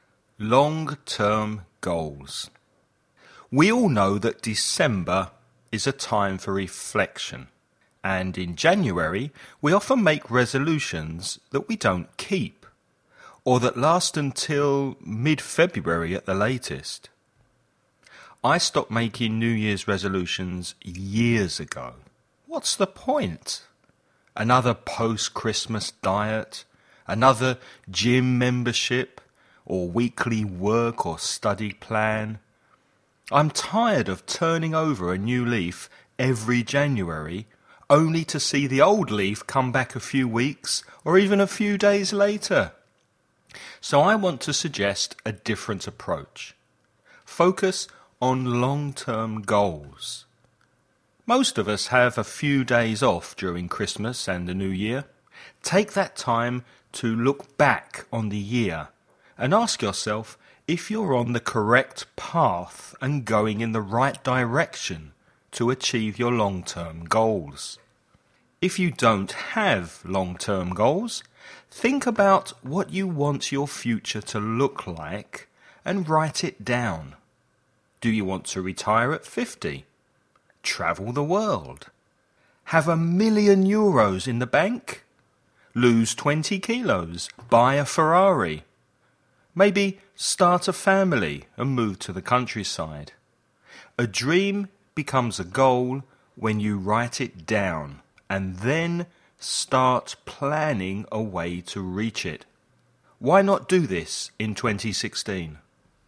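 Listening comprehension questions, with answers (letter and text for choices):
Before you listen, read the following questions about long-term goals.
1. In which month do we often make resolutions?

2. What expression does the speaker use for starting something new, reforming and beginning again?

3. What new approach does the speaker suggest we use instead of making resolutions?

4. What expression does the speaker use for 'some holiday time'?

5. Which of the following does the speaker NOT use as an example of a long-term goal?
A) Early retirement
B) An expensive sports car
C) Get married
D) Change location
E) See different countries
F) Have children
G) Get rich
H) Lose weight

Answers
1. January
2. turning over a new leaf
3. Focus on long-term goals
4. a few days off
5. C) Get married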